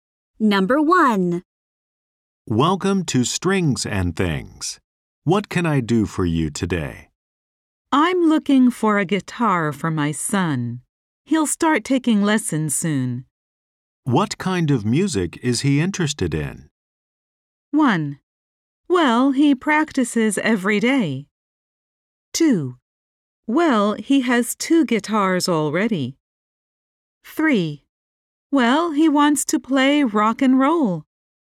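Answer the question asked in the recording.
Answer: 3: Well, he wants to play rock and roll.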